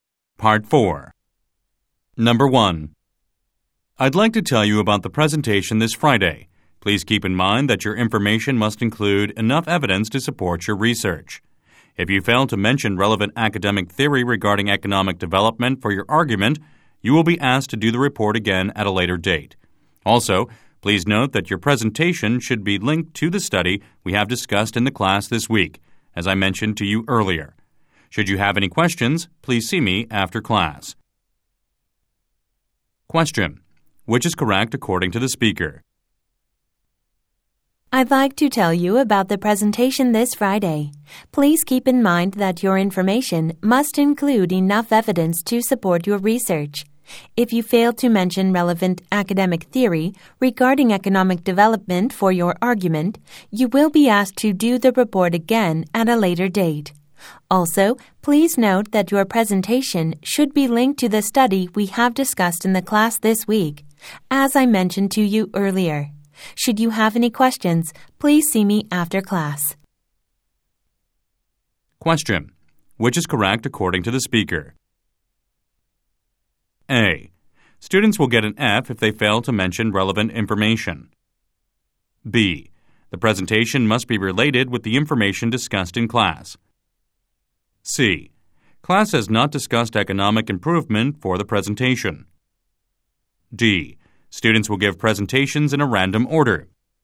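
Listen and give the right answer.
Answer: B: The presentation must be related with the information discussed in class.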